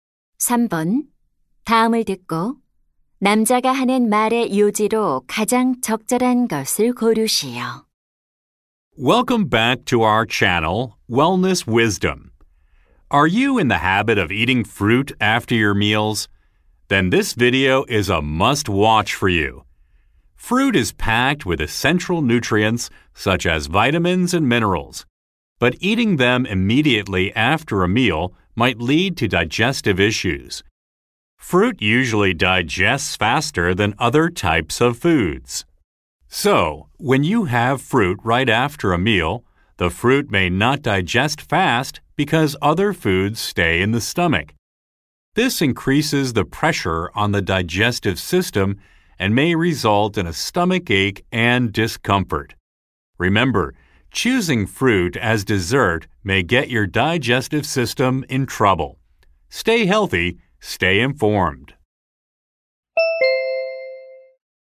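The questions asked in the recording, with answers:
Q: 다음을 듣고 남자가 하는 말의 요지로 가장 적절한 것을 고르시오.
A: 식사 직후 과일을 먹으면 소화 문제를 일으킬 수 있다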